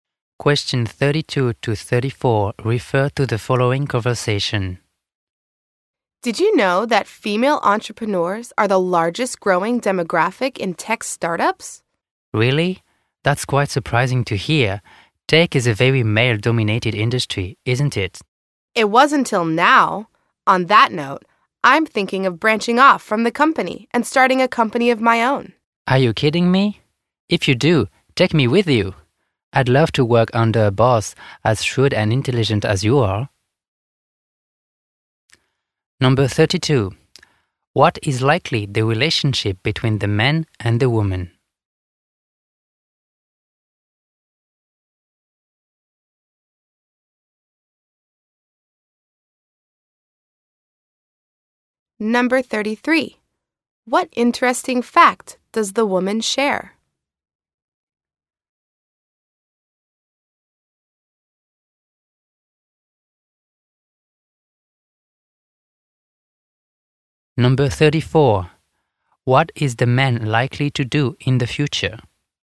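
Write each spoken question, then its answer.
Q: What interesting fact does the woman share?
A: Female entrepreneurs are the largest growing demographic in tech startups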